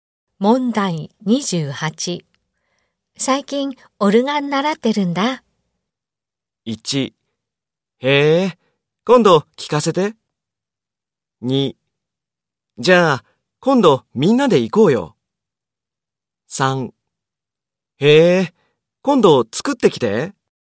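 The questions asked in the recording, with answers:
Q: 最近、オルガン習ってるんだ。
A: 1: へえ、今度聞かせて。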